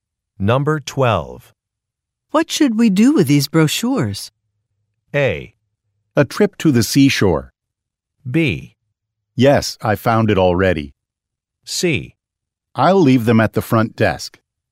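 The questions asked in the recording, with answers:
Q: What should we do with these brochures?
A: C: I'll leave them at the front desk.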